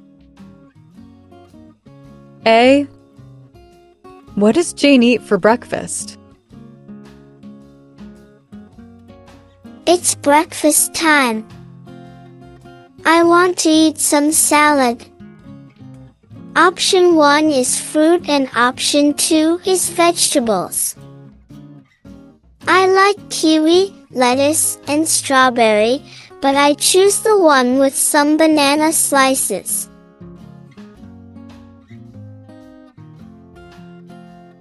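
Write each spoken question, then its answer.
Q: What does Jane eat for breakfast?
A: Option 1: fruit salad (with banana slices)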